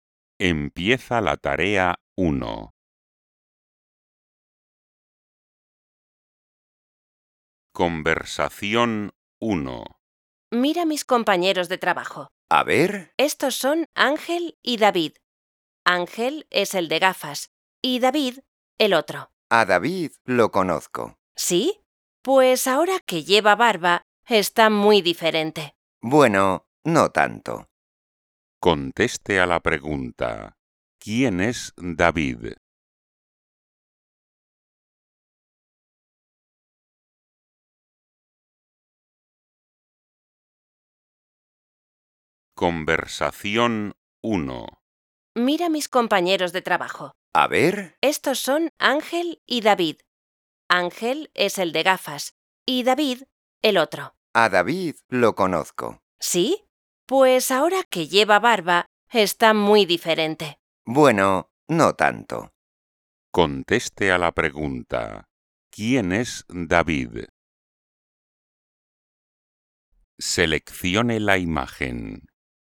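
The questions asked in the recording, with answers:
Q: ¿quién es David?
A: El que no lleva gafas y tiene barba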